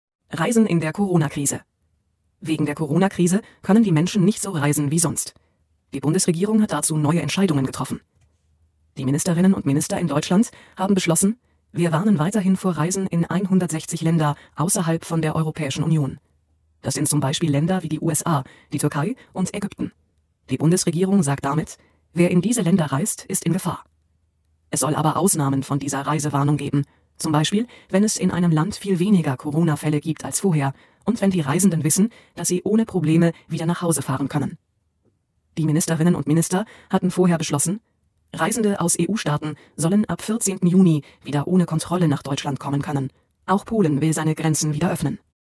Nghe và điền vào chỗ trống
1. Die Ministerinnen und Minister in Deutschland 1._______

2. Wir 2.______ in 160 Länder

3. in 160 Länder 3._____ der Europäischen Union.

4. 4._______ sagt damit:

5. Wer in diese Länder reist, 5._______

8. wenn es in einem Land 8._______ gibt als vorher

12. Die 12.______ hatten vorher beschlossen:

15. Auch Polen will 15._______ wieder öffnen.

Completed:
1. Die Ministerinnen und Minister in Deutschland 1.haben beschlossen
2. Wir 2.warnen weiterhin vor Reisen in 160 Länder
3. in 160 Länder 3.außerhalb von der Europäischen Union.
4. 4.Die Bundes-Regierung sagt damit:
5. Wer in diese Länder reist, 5.ist in Gefahr
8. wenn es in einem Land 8.viel weniger Corona-Fälle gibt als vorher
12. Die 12.Ministerinnen und Minister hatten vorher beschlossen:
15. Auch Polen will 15.seine Grenzen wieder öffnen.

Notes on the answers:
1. Haben beschlossen: quyết định một việc gì.
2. Jdn vor Dativ warnen: cảnh báo, chống lại một việc gì đó.
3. Außerhalb von: phía bên ngoài.
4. Die Bundes-Regierung: chính phủ liên bang.
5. In Gefahr sein: chứa rủi ro, ẩn chứa nguy cơ cao.
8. viel weniger Corona-Fälle: rất ít ca nhiễm Corona.
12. Die Ministerinnen und Minister: Các bộ trưởng.
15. seine Grenzen wieder öffnen: mở cửa lại biên giới.

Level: A2